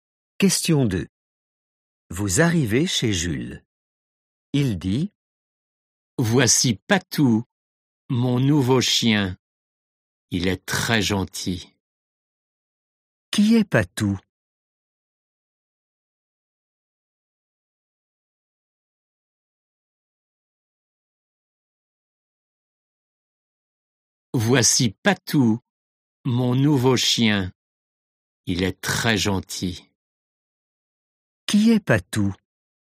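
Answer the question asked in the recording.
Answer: son nouveau chien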